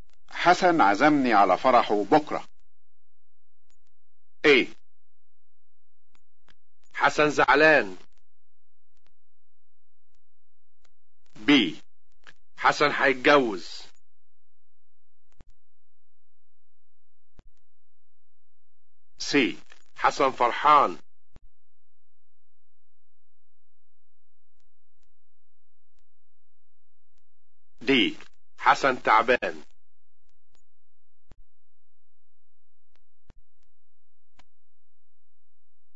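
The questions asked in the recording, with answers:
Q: حسن عزمني على فرحه بكرة.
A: B: حسن هيتجوز.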